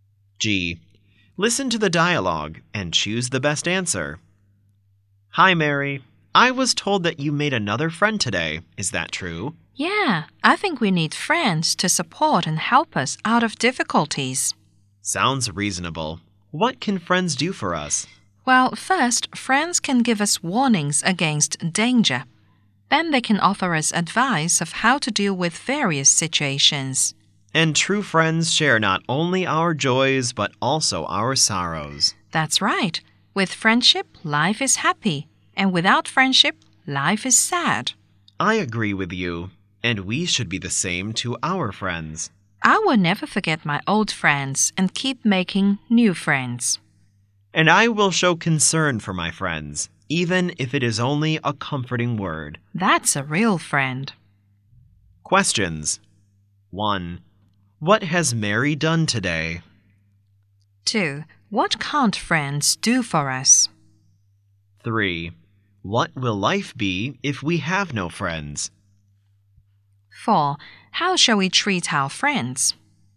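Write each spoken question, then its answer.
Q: What has Mary done today?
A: She made another friend

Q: What will life be if we have no friends?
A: Sad

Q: How shall we treat our friends?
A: Be the same to them as they are to us: never forget old friends, keep making new ones, and show concern for them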